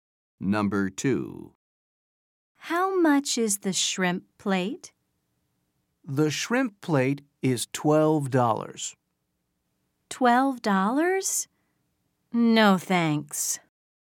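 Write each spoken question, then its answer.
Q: How much is the shrimp plate?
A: $12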